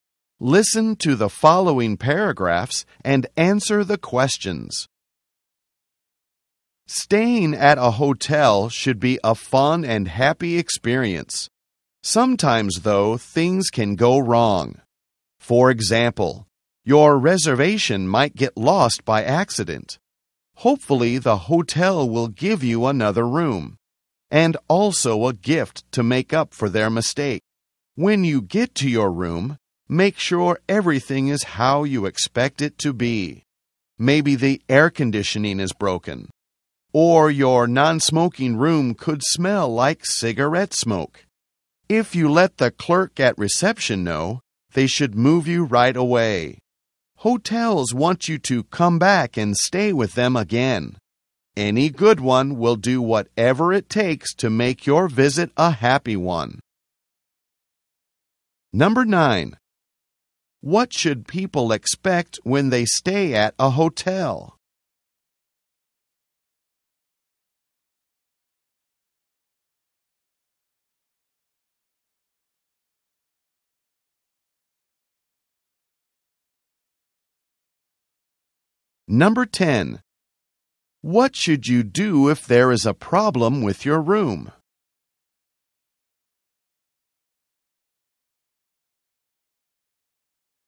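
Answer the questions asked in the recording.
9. A fun and happy experience
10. Tell the clerk at reception.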